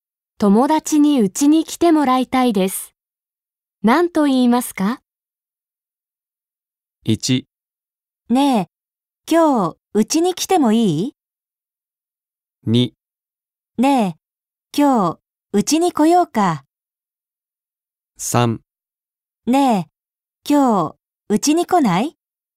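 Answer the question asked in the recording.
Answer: 3: ねえ、今日、家に来ない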